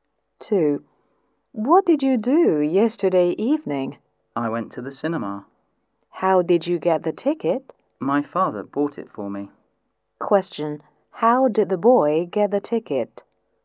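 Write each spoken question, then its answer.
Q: How did the boy get the ticket?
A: His father bought it for him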